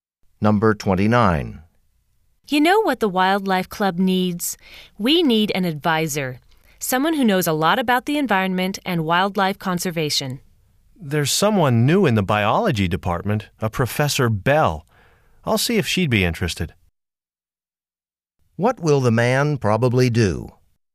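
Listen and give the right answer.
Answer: Ask Professor Bell if she'd be the club's advisor.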